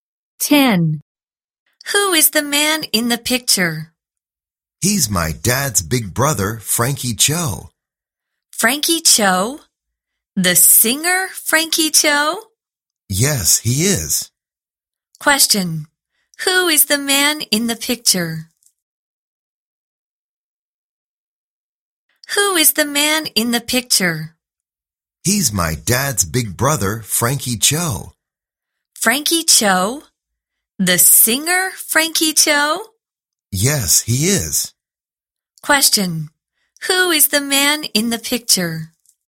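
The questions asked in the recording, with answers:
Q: Who is the man in the picture?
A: Frankie Cho, the boy's uncle (his dad's big brother), a singer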